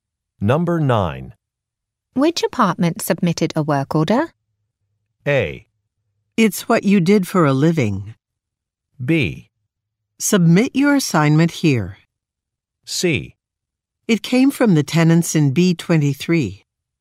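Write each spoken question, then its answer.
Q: Which apartment submitted a work order?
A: C: It came from the tenants in B23.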